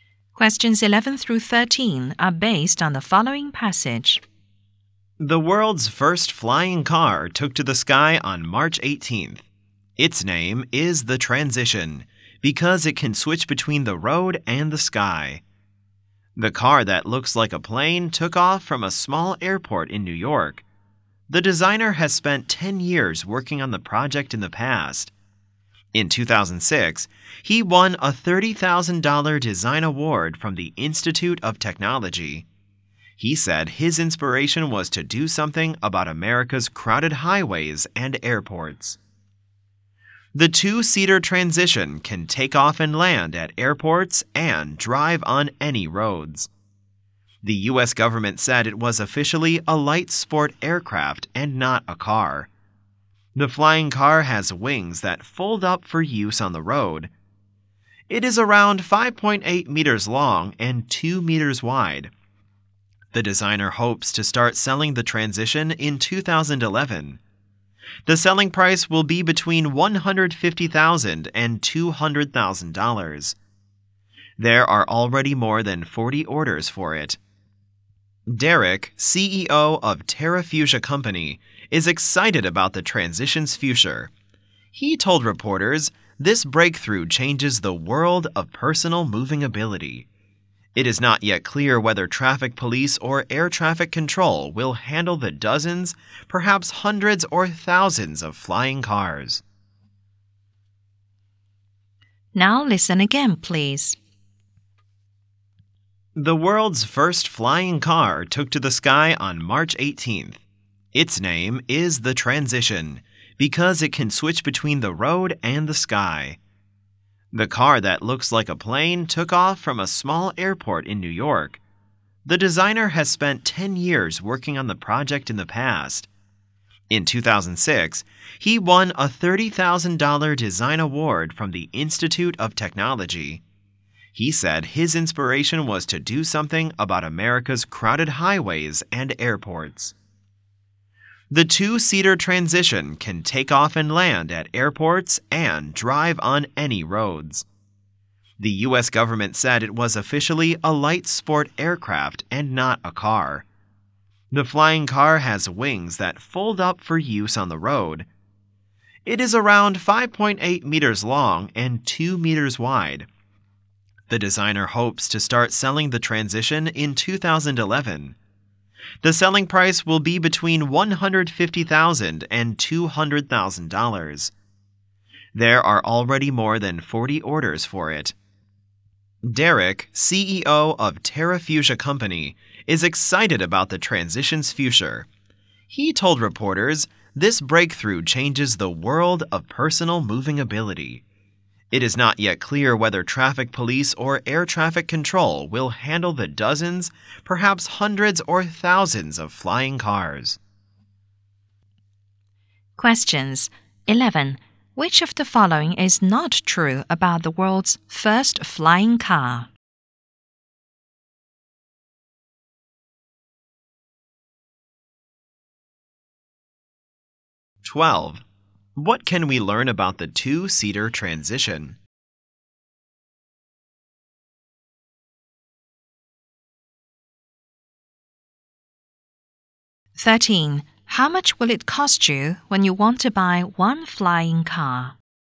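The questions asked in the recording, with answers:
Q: How much will it cost you when you want to buy one flying car?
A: Between $150,000 and $200,000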